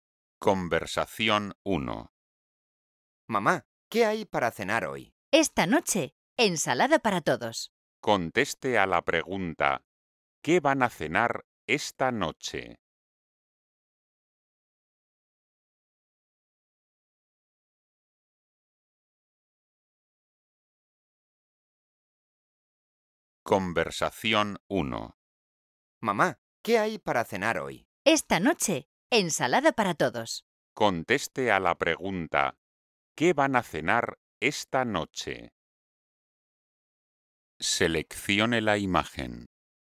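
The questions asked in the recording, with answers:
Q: ¿qué van a cenar esta noche?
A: ensalada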